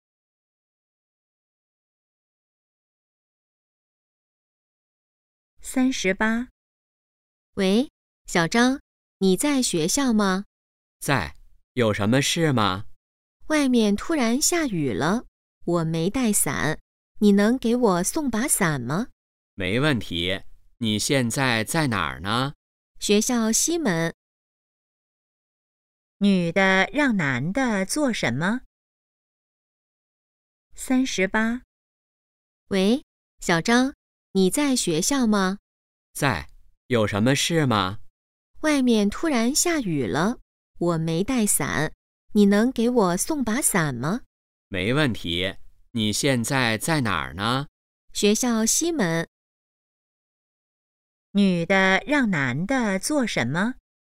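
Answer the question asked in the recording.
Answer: 给她送把伞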